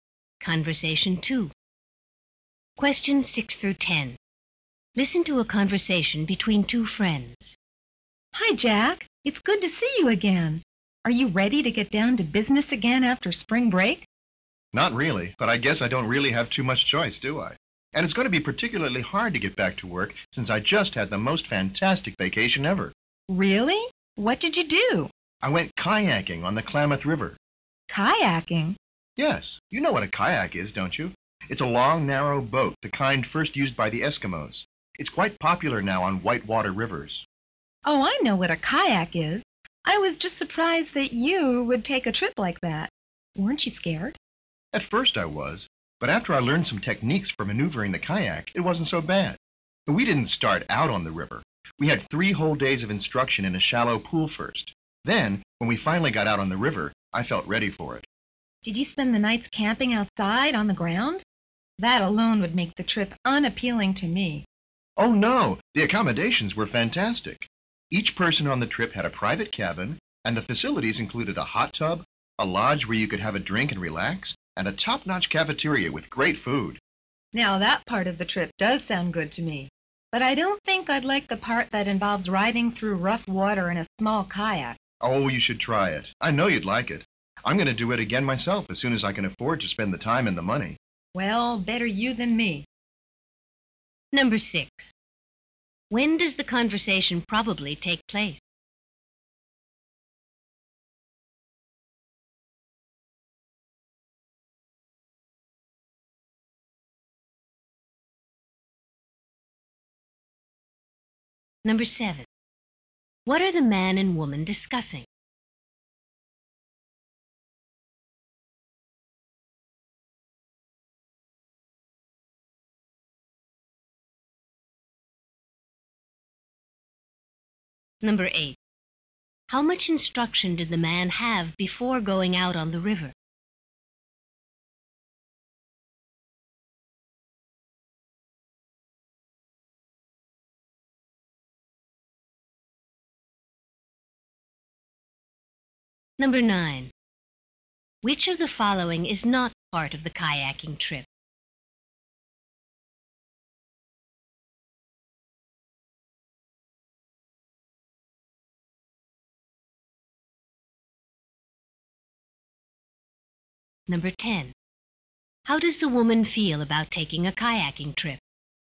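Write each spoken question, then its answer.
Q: When does the conversation probably take place?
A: Right after spring break

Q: What are the man and woman discussing?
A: The man's kayaking trip during his vacation

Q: How much instruction did the man have before going out on the river?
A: Three whole days

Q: Which of the following is not part of the kayaking trip?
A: Camping outside on the ground

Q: How does the woman feel about taking a kayaking trip?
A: She doesn't want to go on one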